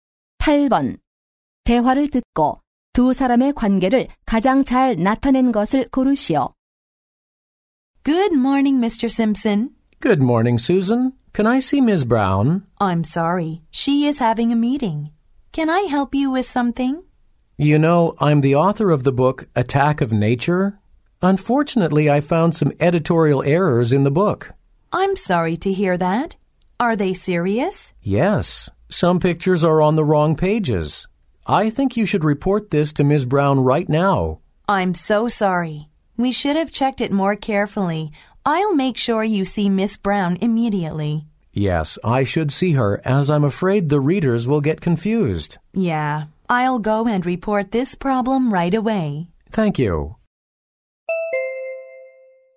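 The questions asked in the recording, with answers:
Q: 대화를 듣고 두 사람의 관계를 가장 잘 나타낸 것을 고르시오.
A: 작가 - 출판사 직원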